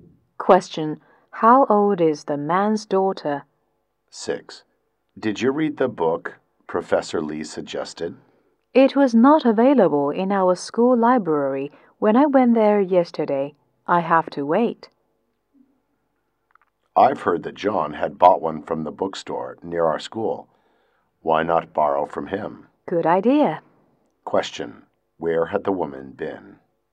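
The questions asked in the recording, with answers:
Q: Where had the woman been?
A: The school library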